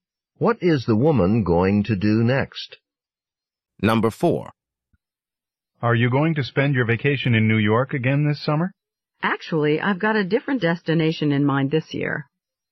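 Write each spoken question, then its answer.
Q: What does the woman mean?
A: She plans to vacation somewhere other than New York.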